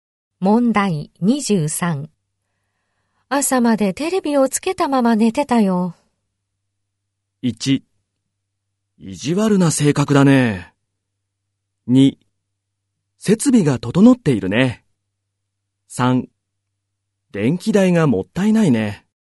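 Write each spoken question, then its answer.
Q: 朝までテレビをつけたまま寝てたよ。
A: 3: 電気代がもったいないね。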